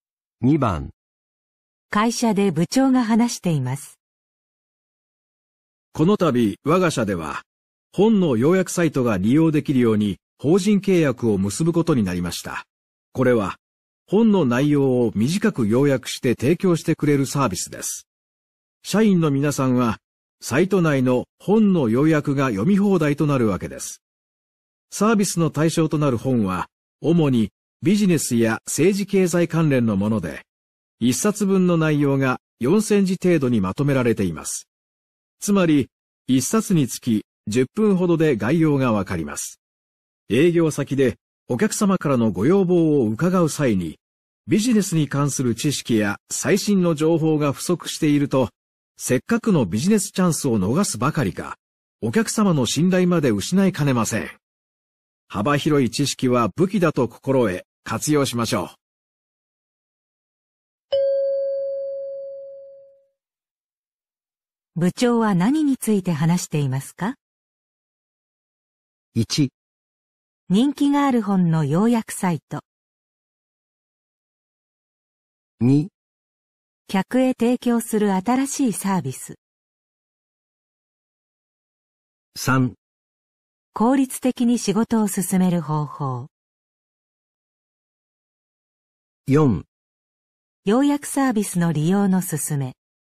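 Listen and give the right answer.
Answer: 4: 要約サービスの利用の勧め。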